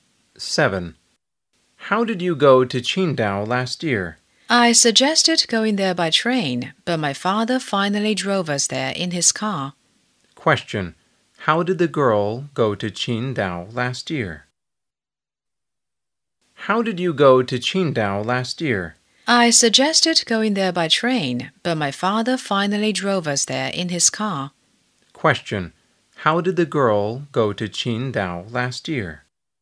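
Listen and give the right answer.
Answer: By car (her father drove them)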